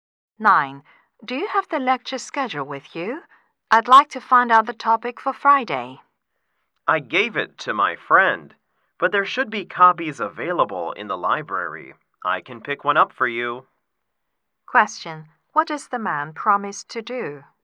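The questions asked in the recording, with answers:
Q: What does the man promise to do?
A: Pick up a copy of the lecture schedule from the library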